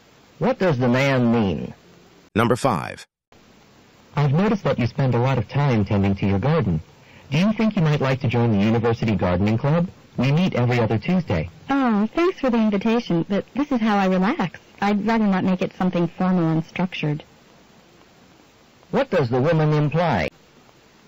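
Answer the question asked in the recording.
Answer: She won't join the club; she prefers gardening informally to relax.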